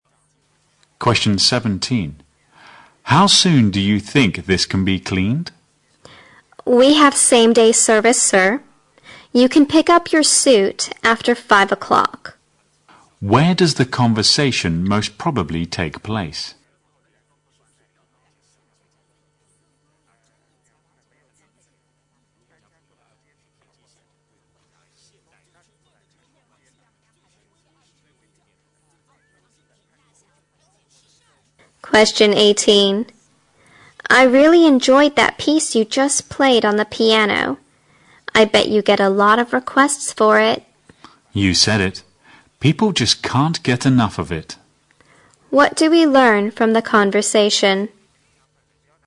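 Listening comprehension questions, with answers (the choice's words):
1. Where does the conversation most probably take place?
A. At an information service.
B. At a car wash point.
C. At a repair shop.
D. At a dry cleaner's.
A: At a dry cleaner's.

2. What do we learn from the conversation?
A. The woman came to the concert at the man's request.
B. The man is already fed up with playing the piano.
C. The piece of music the man played is very popular.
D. The man's unique talents are the envy of many people.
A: The piece of music the man played is very popular.

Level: 大学英语四级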